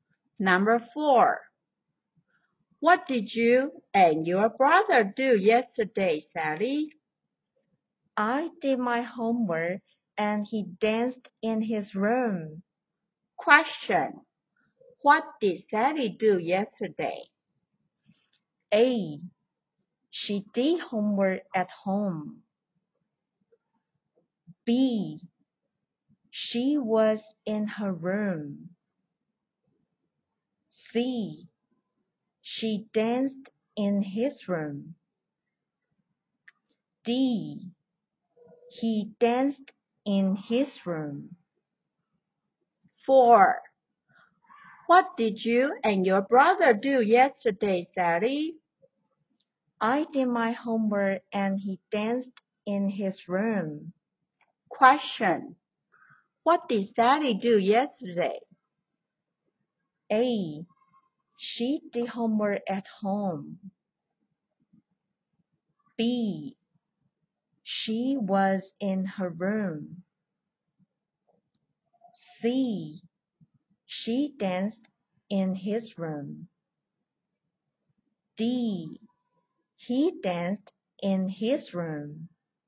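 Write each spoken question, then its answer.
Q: What did Sally do yesterday?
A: A: She did homework at home.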